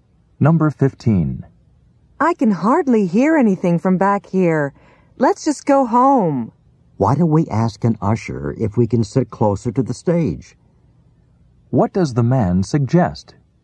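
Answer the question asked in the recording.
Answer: Asking an usher if they can sit closer to the stage.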